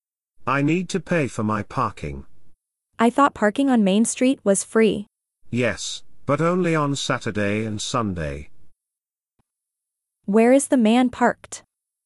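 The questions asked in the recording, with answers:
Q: Where is the man parked?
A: On Main Street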